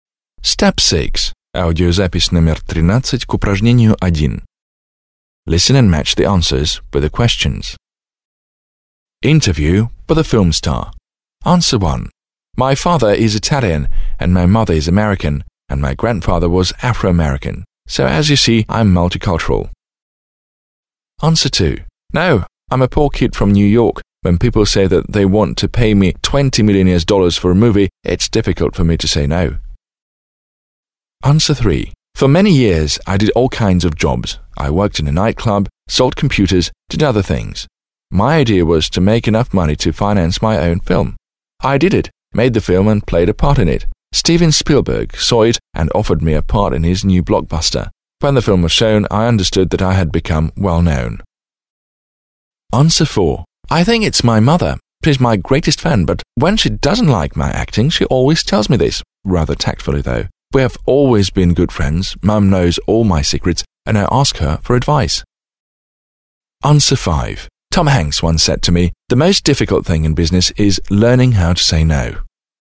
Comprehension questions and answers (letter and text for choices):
1. Listen to a TV interview with an American film star. Match the questions below (a-e) with the star's answers (1-5), (13).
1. 1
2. 2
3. 3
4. 4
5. 5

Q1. What's the best piece of advice anyone has ever given you?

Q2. Are your partners rich?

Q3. How did you become famous?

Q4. Where do you and your family come from?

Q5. Who is the most important person in your life?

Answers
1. 5. 5
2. 2. 2
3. 3. 3
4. 1. 1
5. 4. 4

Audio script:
2. No, I'm a poor kid from New York. When people say that they want to pay me $20 million for a movie, it's difficult for me to say "no!".
3. For many years I did all kinds of jobs. I worked in a night club, sold computers, did other things. My idea was to make enough money to finance my own film. I did it, made the film and played a part in it. Steven Spielberg saw it and offered me a part in his new blockbuster. When the film was shown I understood that I had become well known.
4. I think it's my mother. She is my greatest fan but when she doesn't like my acting, she always tells me, rather tactfully though. We have always been good friends. Mum knows all my secrets and I ask her for advice.

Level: 9 класс